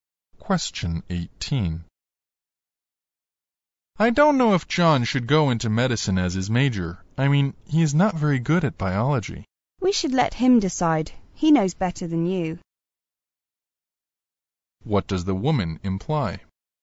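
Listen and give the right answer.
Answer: John should choose his major himself.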